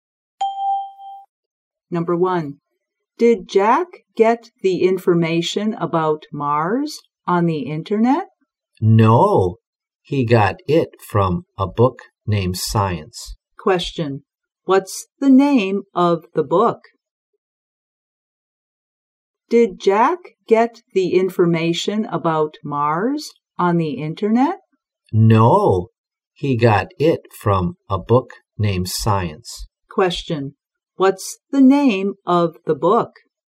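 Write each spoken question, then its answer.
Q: What's the name of the book?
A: Science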